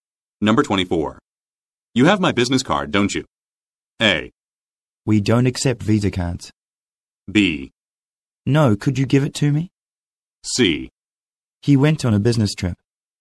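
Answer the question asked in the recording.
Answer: B: No, could you give it to me?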